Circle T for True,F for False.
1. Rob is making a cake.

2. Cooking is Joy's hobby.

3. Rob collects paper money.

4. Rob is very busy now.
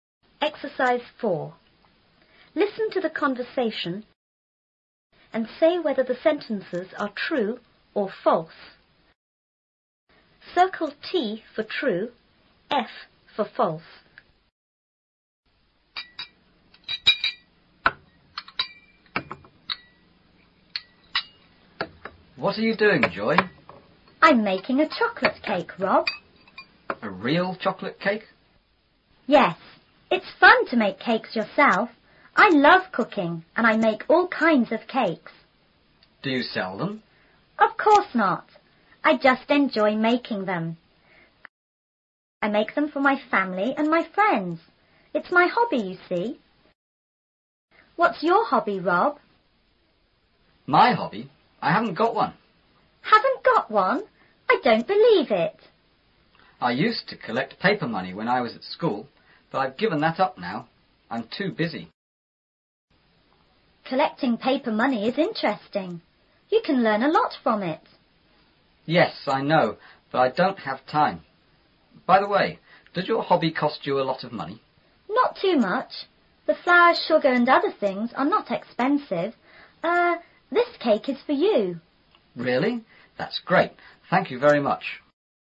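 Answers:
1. F
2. T
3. F
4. T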